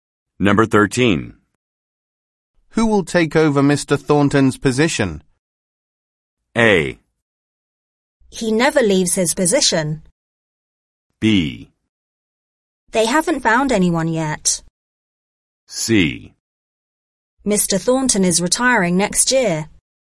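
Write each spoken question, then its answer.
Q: Who will take over Mr. Thornton's position?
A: B: They haven't found anyone yet.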